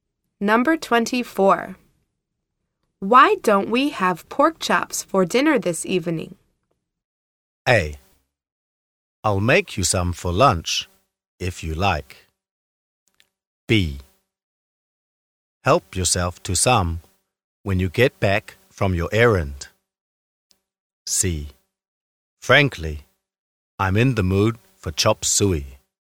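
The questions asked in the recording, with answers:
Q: Why don't we have pork chops for dinner this evening?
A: C: Frankly, I'm in the mood for chop suey.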